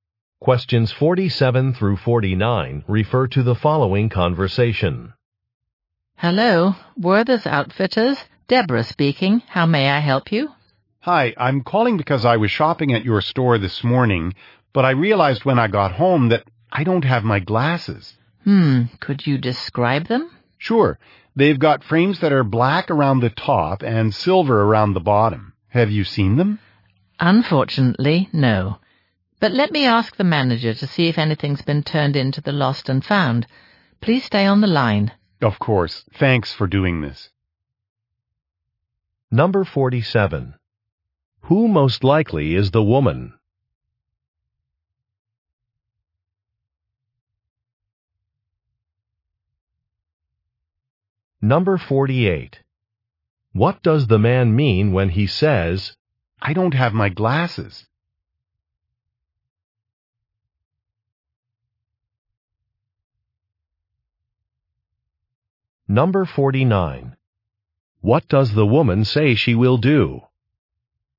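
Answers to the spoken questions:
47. A store employee
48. He left his glasses at the store
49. Ask the manager to check the lost and found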